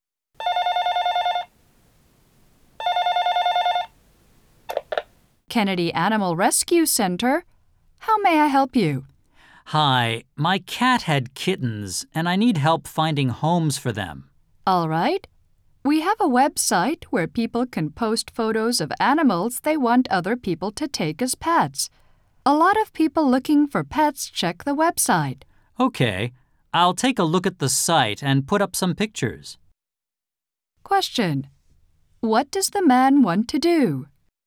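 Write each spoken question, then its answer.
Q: What does the man want to do?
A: Find homes for his cat's kittens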